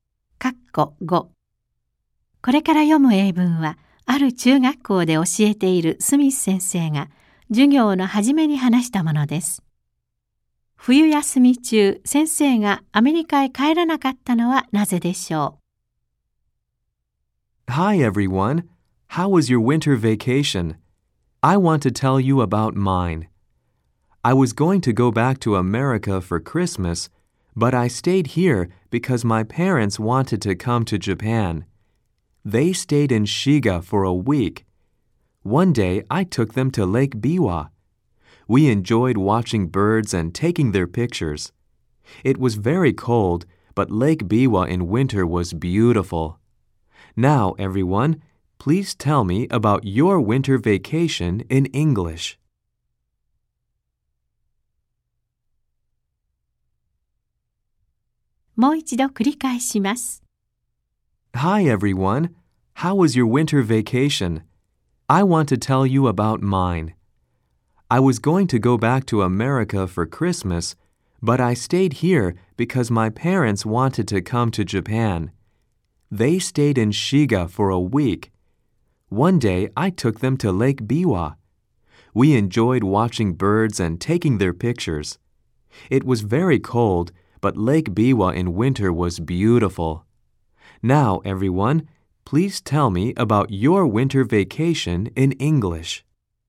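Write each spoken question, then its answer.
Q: 冬休み中、先生がアメリカへ帰らなかったのはなぜでしょう。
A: 両親が日本に来たがったから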